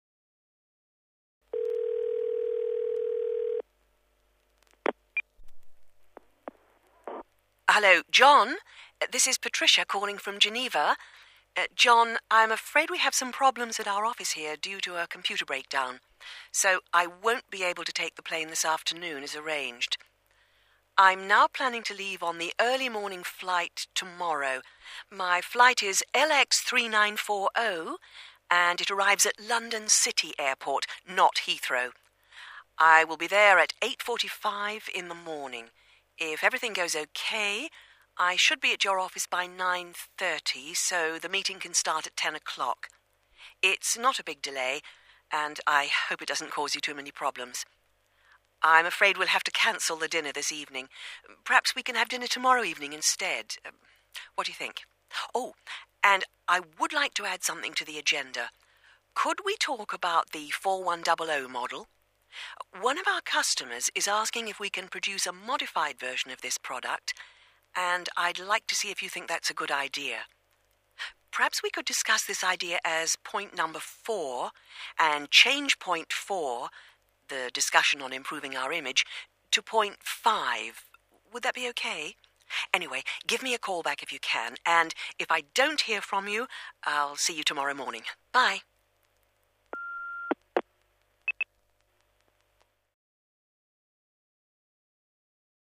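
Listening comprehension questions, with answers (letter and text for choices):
B. Listen and mark the correct answer.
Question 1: Where is Patricia calling from?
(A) From Geneva.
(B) From Grenoble.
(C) From Genoa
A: (A) From Geneva.

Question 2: Why can't she travel this afternoon?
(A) Because of a computer problems in her office.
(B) Because her computer broke down.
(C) Because she has another important appointment.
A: (A) Because of a computer problems in her office.

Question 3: When does she expect to arrive at John's office?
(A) She will be there at 10.00.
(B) She will be there at 8:45.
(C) She should be there by 9.30.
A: (C) She should be there by 9.30.

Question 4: Which product will they discuss?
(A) 41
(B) 41000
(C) 4100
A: (C) 4100

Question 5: What does Patricia want to do with the agenda?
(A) She wants to follow it as it is.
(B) She wants to add one point to it.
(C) She wants to remove one point from it.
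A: (B) She wants to add one point to it.

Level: B2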